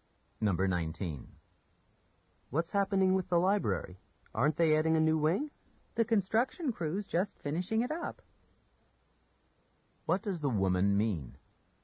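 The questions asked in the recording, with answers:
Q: What does the woman mean?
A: The new wing is almost finished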